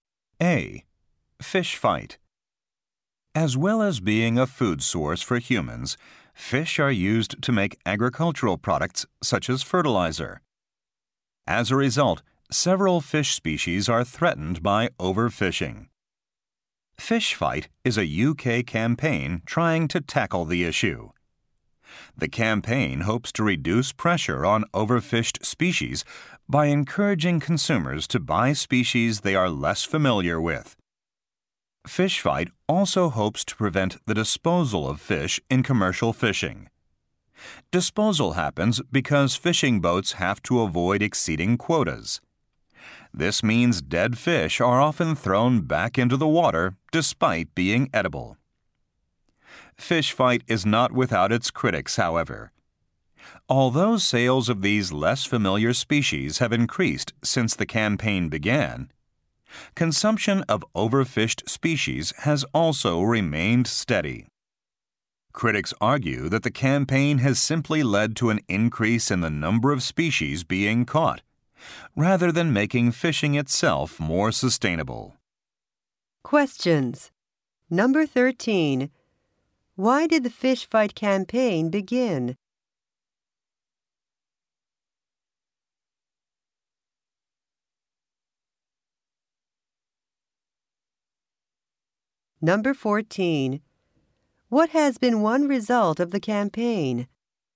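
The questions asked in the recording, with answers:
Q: Why did the Fish Fight campaign begin?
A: To tackle overfishing of some species

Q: What has been one result of the campaign?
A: Sales of less familiar species have increased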